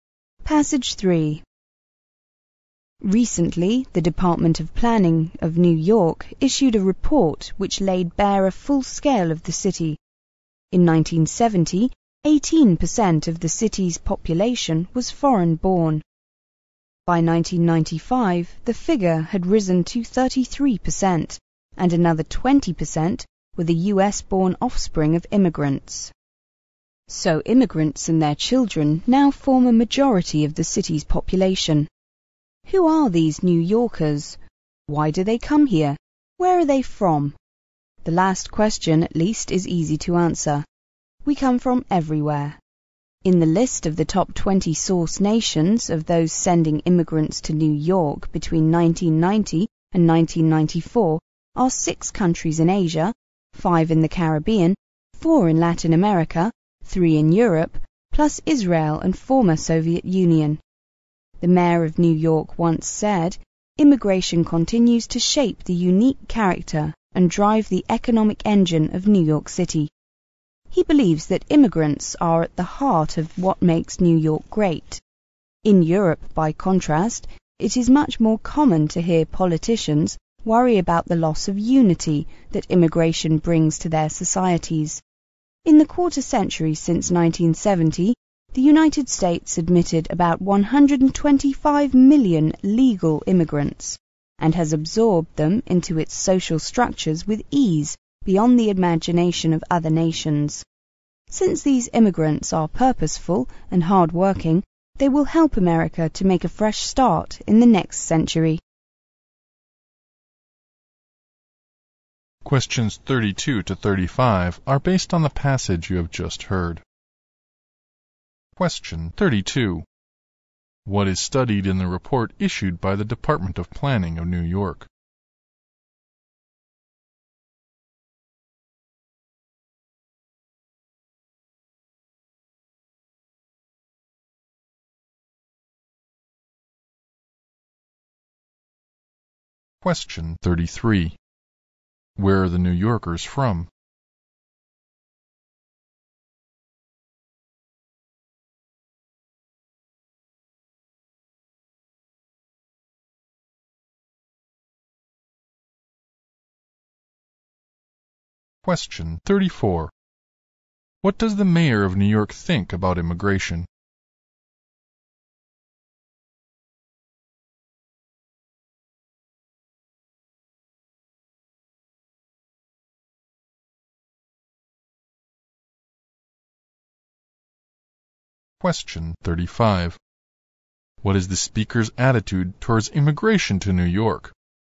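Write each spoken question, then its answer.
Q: What is studied in the report issued by the Department of Planning of New York?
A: Immigration to New York City

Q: Where are the New Yorkers from?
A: Everywhere

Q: What does the mayor of New York think about immigration?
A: Immigrants are at the heart of what makes New York great

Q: What is the speaker's attitude towards immigration to New York?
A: Positive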